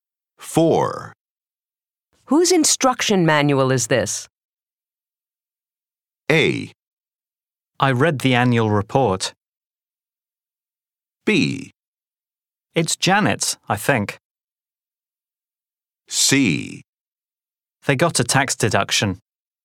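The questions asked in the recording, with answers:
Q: Whose instruction manual is this?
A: B: It's Janet's, I think.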